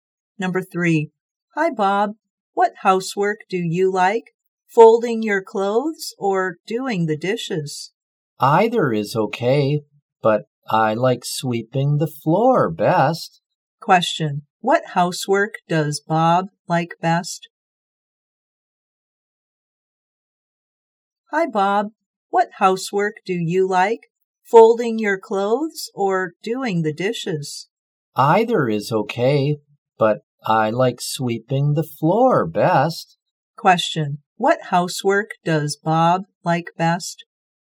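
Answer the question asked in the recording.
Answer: Sweeping the floor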